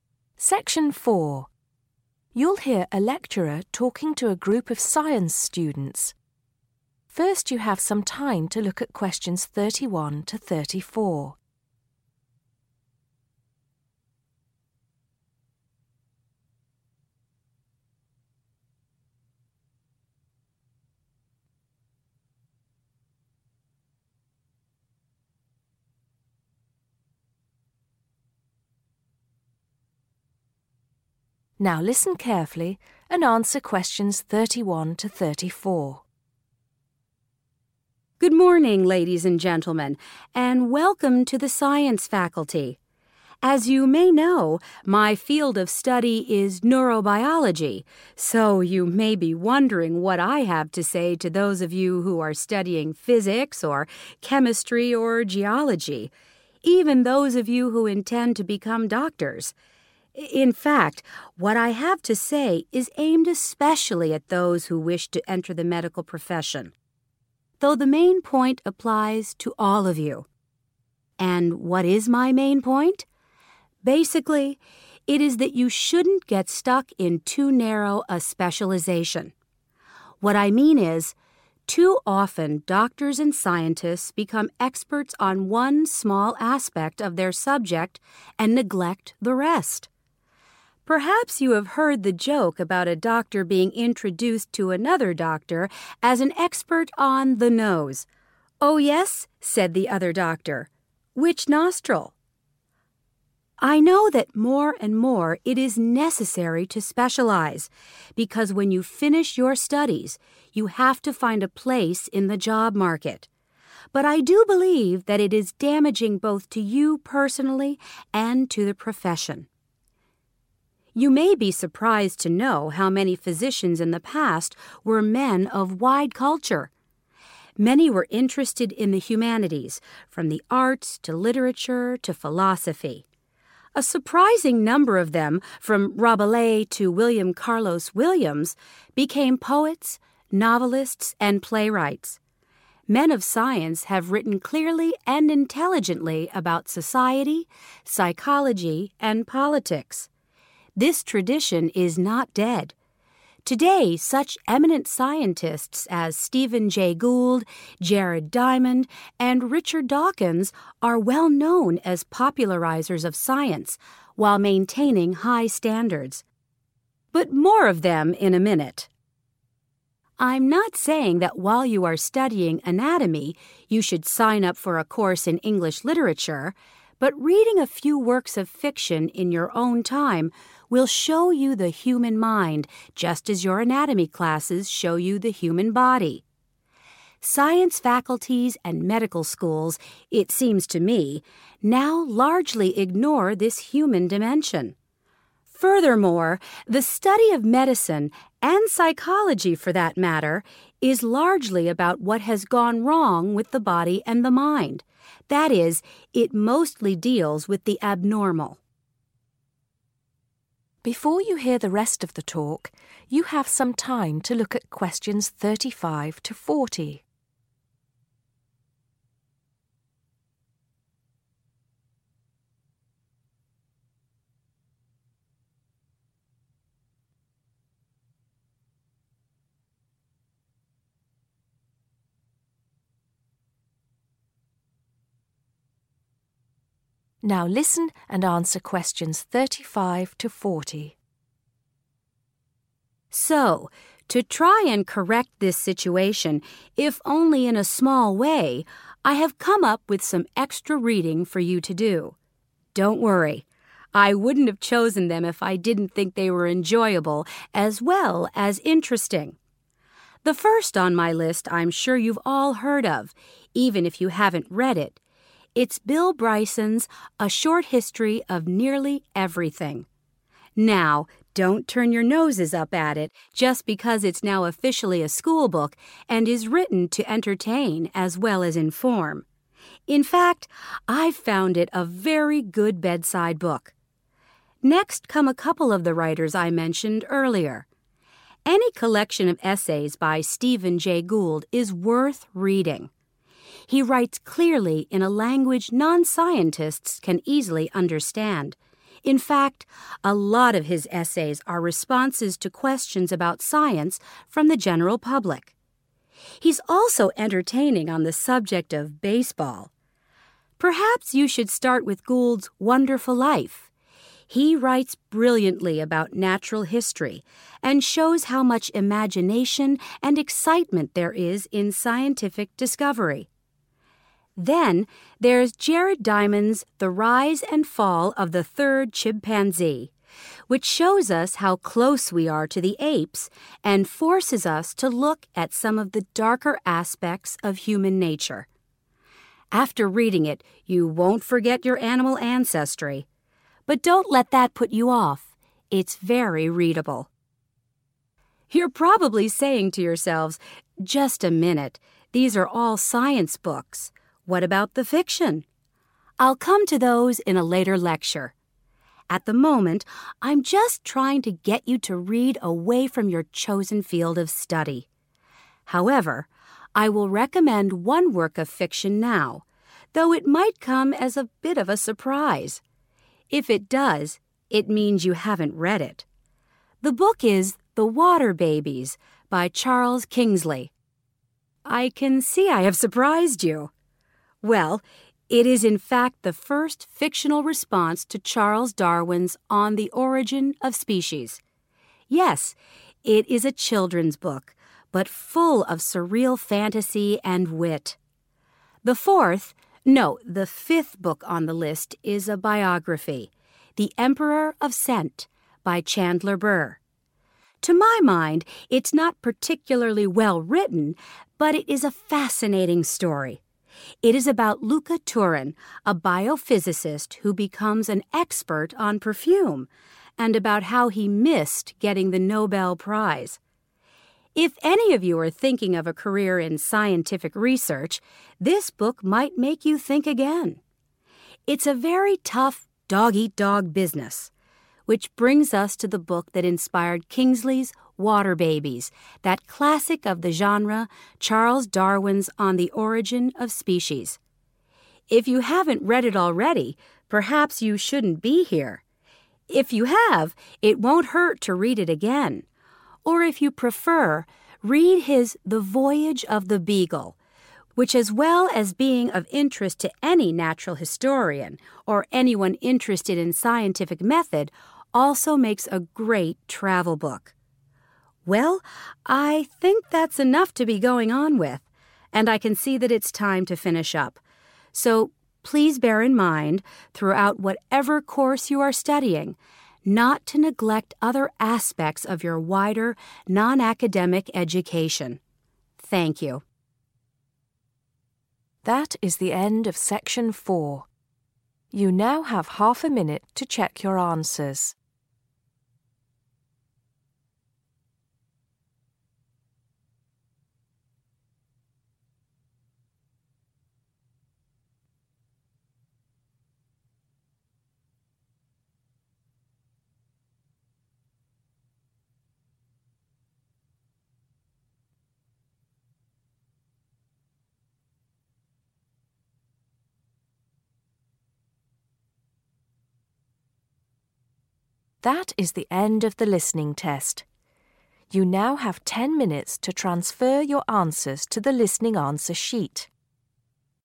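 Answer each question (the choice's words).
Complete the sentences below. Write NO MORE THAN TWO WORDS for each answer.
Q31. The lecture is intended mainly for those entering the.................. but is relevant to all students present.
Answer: medical profession

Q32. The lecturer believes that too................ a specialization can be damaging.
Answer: narrow

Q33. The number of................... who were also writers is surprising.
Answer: physicians

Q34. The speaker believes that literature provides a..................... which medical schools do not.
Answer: human dimension

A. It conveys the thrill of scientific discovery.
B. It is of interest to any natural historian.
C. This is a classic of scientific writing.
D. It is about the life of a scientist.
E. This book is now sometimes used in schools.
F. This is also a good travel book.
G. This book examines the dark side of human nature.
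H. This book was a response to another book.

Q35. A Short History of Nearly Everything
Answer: This book is now sometimes used in schools.

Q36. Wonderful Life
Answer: It conveys the thrill of scientific discovery.

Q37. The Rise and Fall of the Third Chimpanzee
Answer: This book examines the dark side of human nature.

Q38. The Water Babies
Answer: This book was a response to another book.

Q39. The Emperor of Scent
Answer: It is about the life of a scientist.

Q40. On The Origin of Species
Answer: This is a classic of scientific writing.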